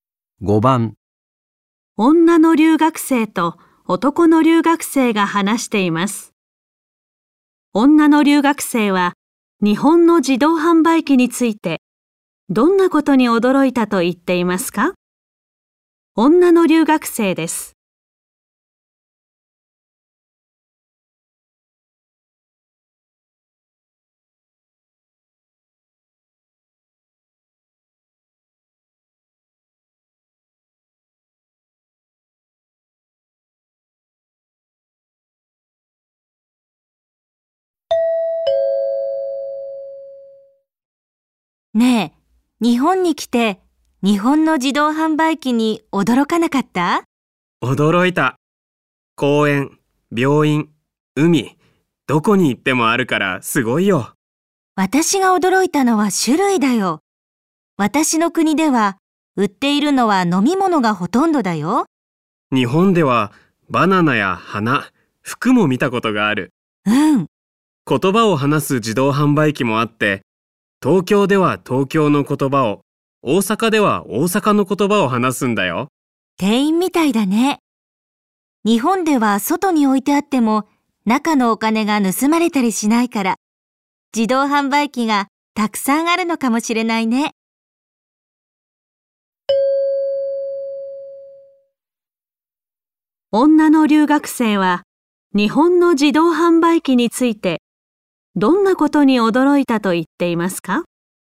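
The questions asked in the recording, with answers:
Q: 女の留学生は日本の自動販売機についてどんなことに驚いたと言っていますか?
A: 売っている物の種類が多いこと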